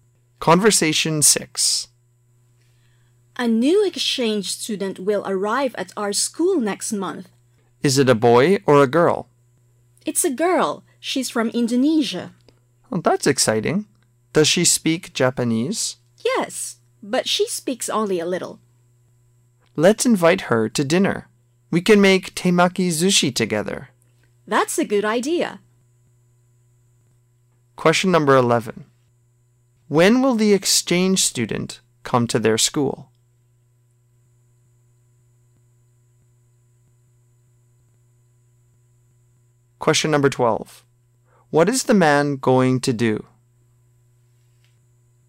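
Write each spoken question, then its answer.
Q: When will the exchange student come to their school?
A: Next month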